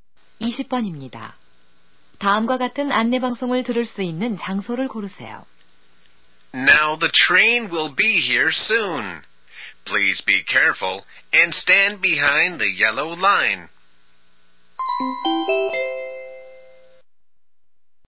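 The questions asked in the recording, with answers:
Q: 다음과 같은 안내 방송을 들을 수 있는 장소를 고르세요.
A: 기차역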